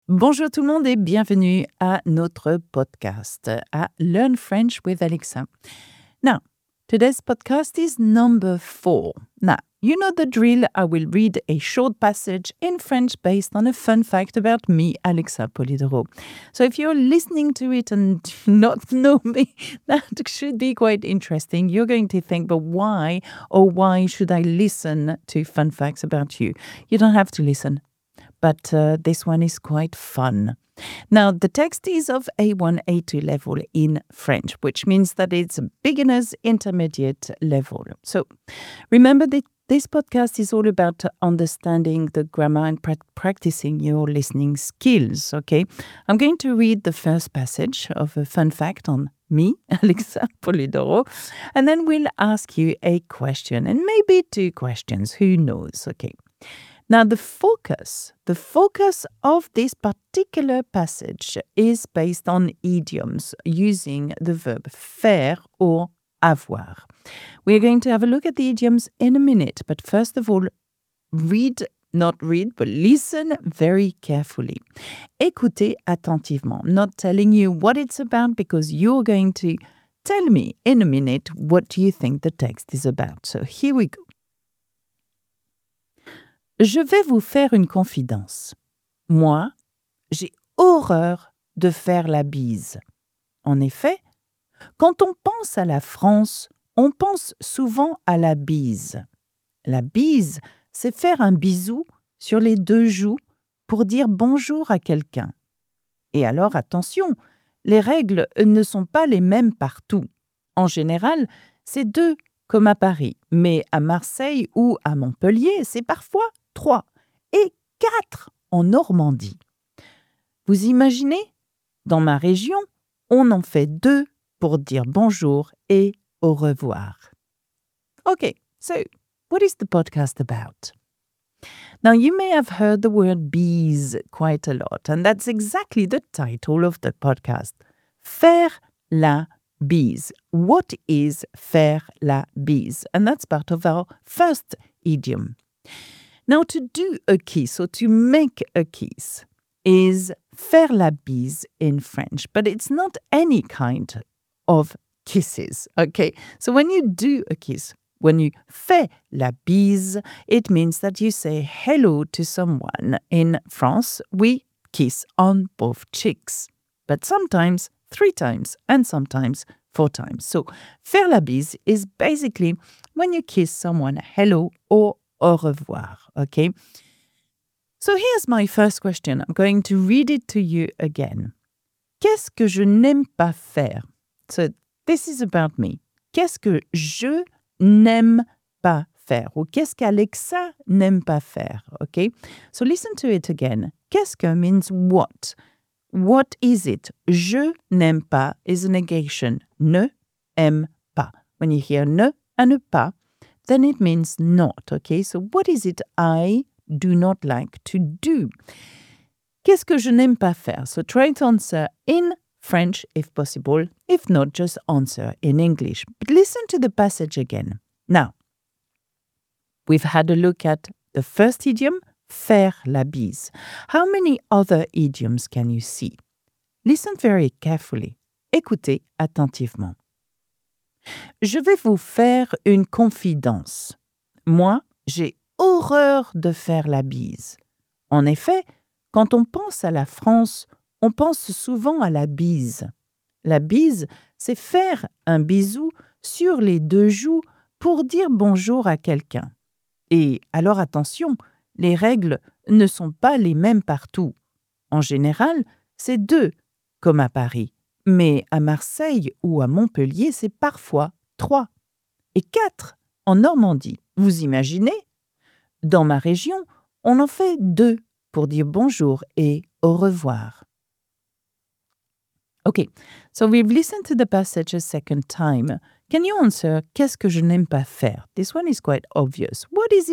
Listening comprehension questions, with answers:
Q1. Qu'est-ce que je n'aime pas faire ?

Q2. Dans quelle région fait-on quatre bises pour dire bonjour ?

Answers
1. Faire la bise
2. La Normandie

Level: A1 - niveau découverte (beginner) / A2